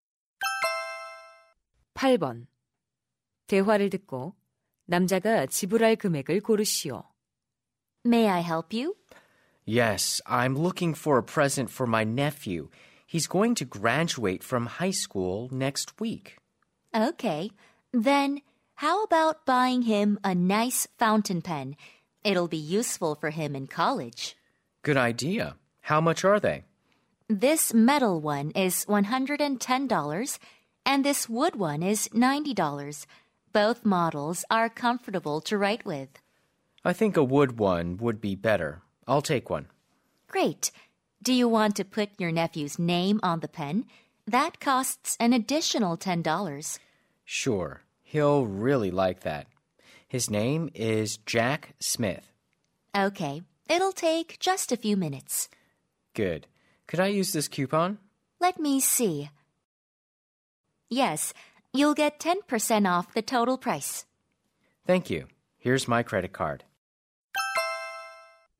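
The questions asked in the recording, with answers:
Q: 대화를 듣고 남자가 지불할 금액을 고르시오.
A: 90달러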